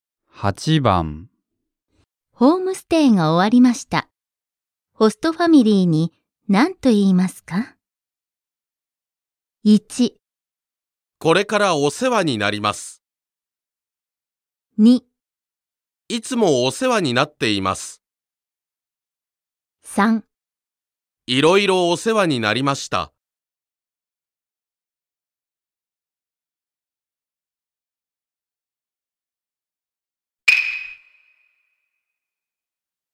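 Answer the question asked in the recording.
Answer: 3: いろいろお世話になりました。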